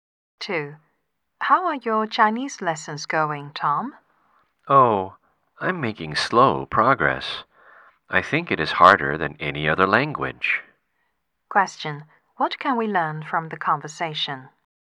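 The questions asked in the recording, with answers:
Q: What can we learn from the conversation?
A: Tom finds learning Chinese hard and is making slow progress.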